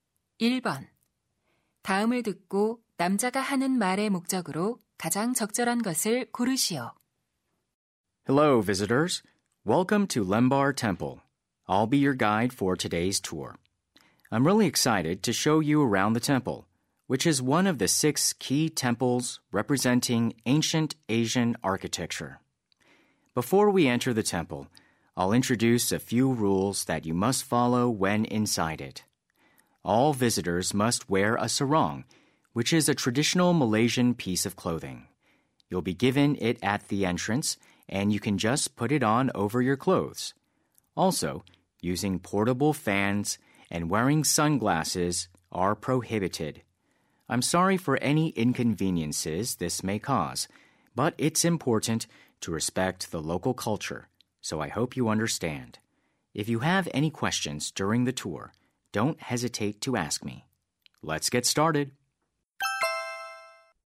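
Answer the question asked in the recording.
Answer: 사원 내부에서 지켜야 할 규칙을 안내하려고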